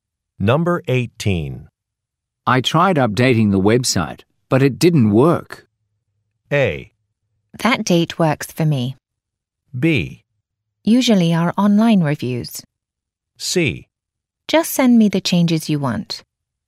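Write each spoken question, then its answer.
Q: I tried updating the website, but it didn't work.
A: C: Just send me the changes you want.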